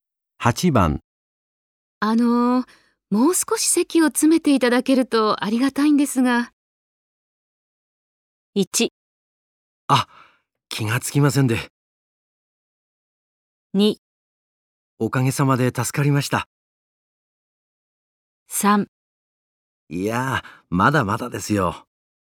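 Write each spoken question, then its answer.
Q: もう少し席を詰めていただけるとありがたいんですが。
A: 1: あ、気がつきませんで。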